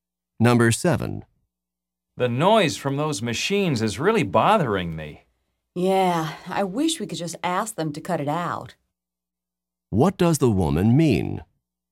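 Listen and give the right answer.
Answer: She wishes they could ask them to stop the noise.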